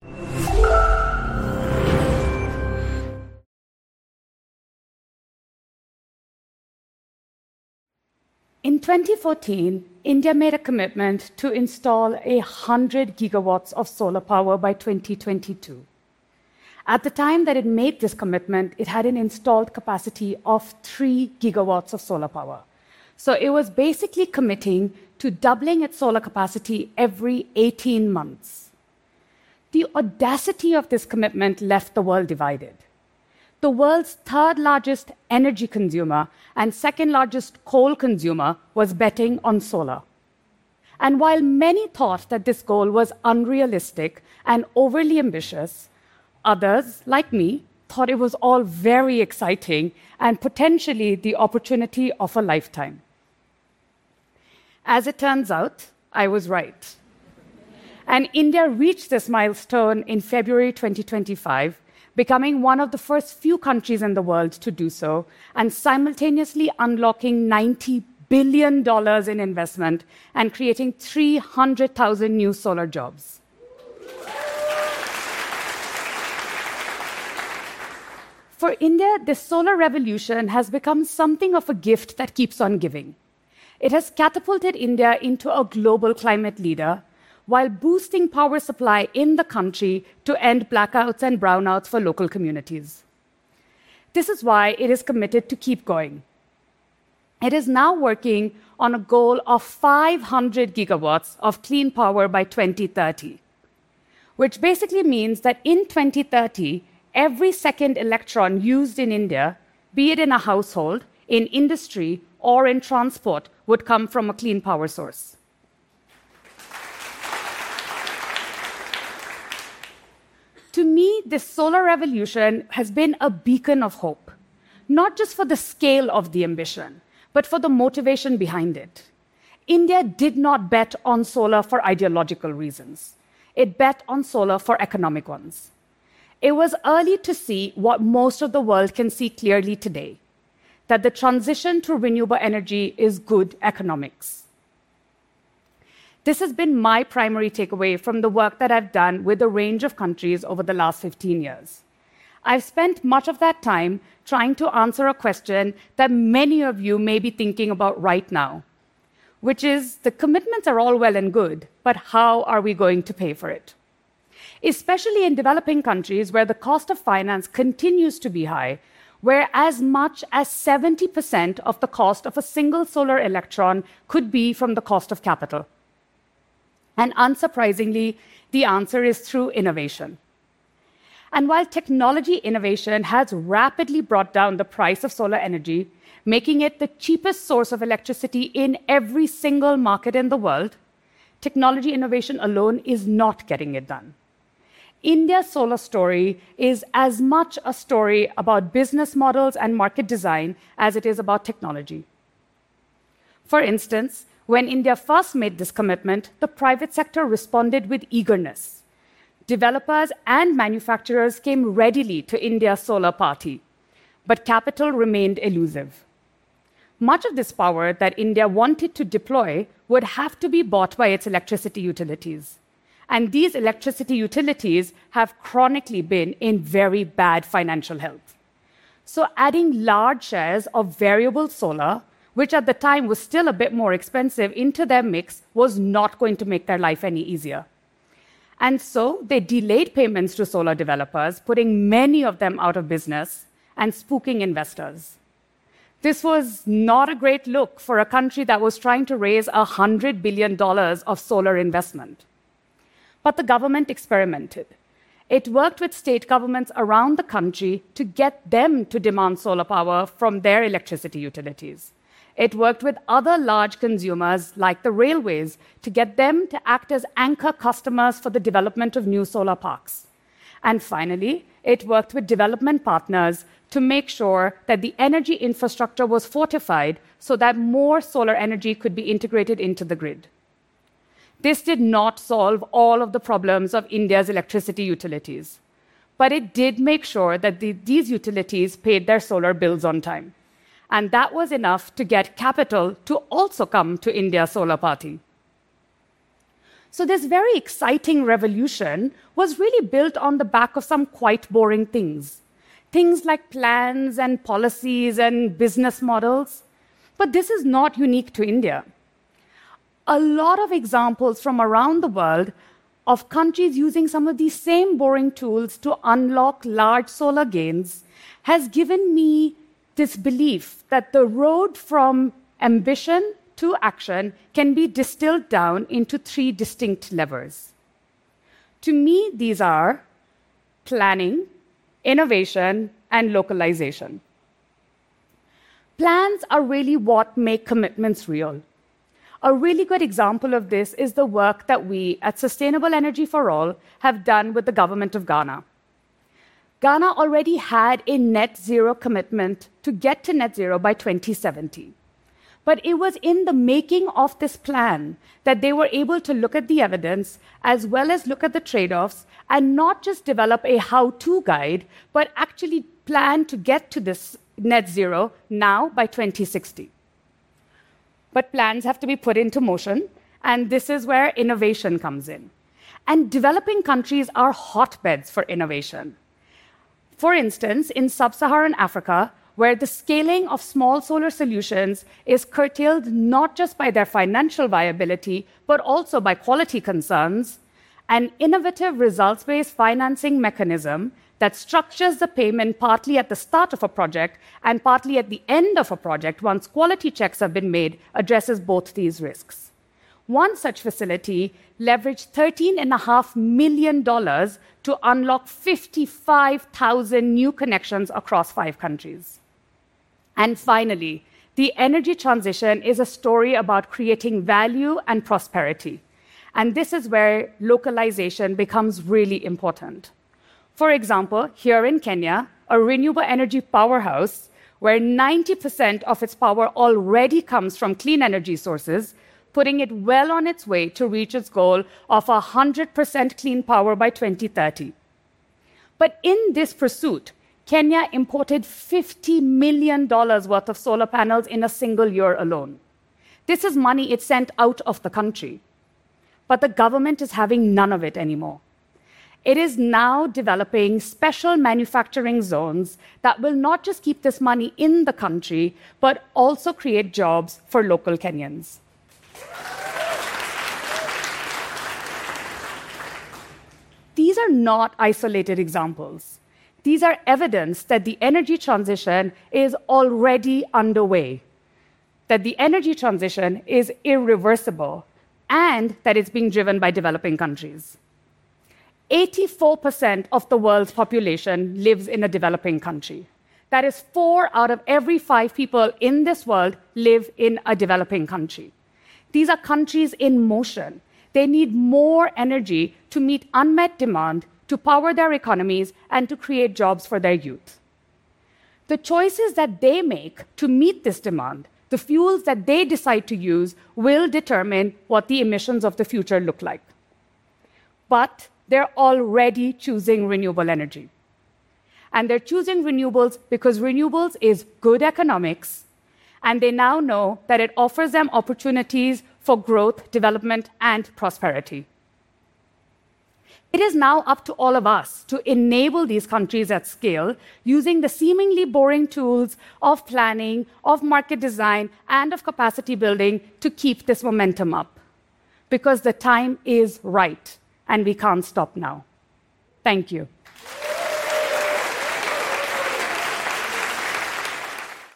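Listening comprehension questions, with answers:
用 1-2 句话用自己的话回答下面的问题。点「✨ AI 判断」后,AI 会对照当天 transcript 给出参考要点与评分。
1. What was India's installed solar capacity in 2014 when it made the 100 gigawatt commitment, and by what date did it actually reach that goal?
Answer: 3 gigawatts; February 2025

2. According to the speaker, what percentage of the cost of a single solar electron in developing countries can come from the cost of capital?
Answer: As much as 70 percent

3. What specific example of innovation in sub-Saharan Africa did the speaker mention, and what were the financial results of that facility?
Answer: A results-based financing mechanism paying partly at the start and partly at the end after quality checks; one facility leveraged $13.5 million to unlock 55,000 new connections across five countries

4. What percentage of Kenya's electricity already comes from clean energy sources, and how much money did Kenya spend importing solar panels in a single year?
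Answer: 90 percent; $50 million

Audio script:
In 2014,
India made a commitment to install 100 gigawatts
of solar power by 2022.
At the time that it made this commitment,
it had an installed capacity of three gigawatts of solar power,
so it was basically committing to doubling its solar capacity every 18 months.
The audacity of this commitment left the world divided.
The world's third-largest energy consumer
and second-largest coal consumer was betting on solar.
And while many thought that this goal was unrealistic
and overly ambitious,
others, like me, thought it was all very exciting
and potentially the opportunity of a lifetime.
As it turns out, I was right.
And India reached this milestone in February 2025,
becoming one of the first few countries in the world to do so,
and simultaneously unlocking 90 billion dollars in investment
and creating 300,000 new solar jobs.
For India, the solar revolution has become something of a gift
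that keeps on giving.
It has catapulted India into a global climate leader,
while boosting power supply in the country
to end blackouts and brownouts for local communities.
This is why it is committed to keep going.
It is now working on a goal of 500 gigawatts of clean power by 2030,
which basically means that in 2030,
every second electron used in India,
be it in a household, in industry or in transport,
would come from a clean power source.
To meet this solar revolution has been a beacon of hope,
not just for the scale of the ambition, but for the motivation behind it.
India did not bet on solar for ideological reasons.
It bet on solar for economic ones.
It was early to see
what most of the world can see clearly today.
That the transition to renewable energy is good economics.
This has been my primary takeaway from the work that I've done
with a range of countries over the last 15 years.
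I've spent much of that time trying to answer a question
that many of you may be thinking about right now,
which is
The commitments are all well and good,
which isThe commitments are all well and good,
but how are we going to pay for it?
Especially in developing countries
where the cost of finance continues to be high,
where as much as 70 percent of the cost of a single solar electron
could be from the cost of capital.
And unsurprisingly, the answer is through innovation.
And while technology innovation
has rapidly brought down the price of solar energy,
making it the cheapest source of electricity
in every single market in the world,
technology innovation alone is not getting it done.
India's solar story is as much a story about business models
and market design as it is about technology.
For instance, when India first made this commitment,
the private sector responded with eagerness.
Developers and manufacturers came readily to India's solar party,
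but capital remained elusive.
Much of this power that India wanted to deploy
would have to be bought by its electricity utilities.
And these electricity utilities
have chronically been in very bad financial health.
So adding large shares of variable solar,
which at the time was still a bit more expensive, into their mix,
was not going to make their life any easier.
And so they delayed payments to solar developers,
putting many of them out of business
and spooking investors.
This was not a great look for a country
that was trying to raise 100 billion dollars of solar investment.
But the government experimented.
It worked with state governments around the country
to get them to demand solar power from their electricity utilities.
It worked with other large consumers, like the railways,
to get them to act as anchor customers
for the development of new solar parks.
And finally, it worked with development partners
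to make sure that the energy infrastructure was fortified
so that more solar energy could be integrated into the grid.
This did not solve all of the problems of India's electricity utilities,
but it did make sure that these utilities paid their solar bills on time.
And that was enough to get capital to also come to India's solar party.
So this very exciting revolution
was really built on the back of some quite boring things.
Things like plans and policies and business models.
But this is not unique to India.
A lot of examples from around the world
of countries using some of these same boring tools
to unlock large solar gains
has given me this belief
that the road from ambition to action
can be distilled down into three distinct levels.
To me, these are planning, innovation and localization.
Plans are really what make commitments real.
A really good example of this
is the work that we at Sustainable Energy For All
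have done with the government of Ghana.
Ghana already had a net-zero commitment to get to net zero by 2070.
But it was in the making of this plan
that they were able to look at the evidence,
as well as look at the trade offs
and not just develop a how-to guide,
but actually plan to get to this net zero now by 2060.
But plans have to be put into motion.
And this is where innovation comes in.
And developing countries are hotbeds for innovation.
For instance, in sub-Saharan Africa,
where the scaling of small solar solutions is curtailed
not just by their financial viability,
but also by quality concerns,
an innovative results-based financing mechanism
that structures the payment partly at the start of a project
and partly at the end of a project,
once quality checks have been made, addresses both these risks.
One such facility leveraged 13.5 million dollars
to unlock 55,000 new connections across five countries.
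And finally, the energy transition
is a story about creating value and prosperity.
And this is where localization becomes really important.
For example, here in Kenya,
a renewable energy powerhouse,
where 90 percent of its power already comes from clean energy sources,
putting it well on its way to reach its goal
of 100 percent clean power by 2030.
But in this pursuit,
Kenya imported 50 million dollars' worth of solar panels
in a single year alone.
This is money it sent out of the country,
but the government is having none of it anymore.
It is now developing special manufacturing zones
that will not just keep this money in the country,
but also create jobs for local Kenyans.
These are not isolated examples.
These are evidence that the energy transition is already underway.
and that it's being driven by developing countries.
Eighty-four percent of the world's population
lives in a developing country.
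That is four out of every five people in this world
These are countries in motion.
They need more energy to meet unmet demand,
to power their economies and to create jobs for their youth.
The choices that they make to meet this demand,
the fuels that they decide to use,
will determine what the emissions of the future look like.
But they're already choosing renewable energy.
And they're choosing renewables because renewables is good economics.
And they now know that it offers them opportunities for growth,
development and prosperity.
It is now up to all of us to enable these countries at scale,
using the seemingly boring tools of planning,
of market design and of capacity building to keep this momentum up.
Because the time is right and we can't stop now.
Thank you.

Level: CEFRB2-C1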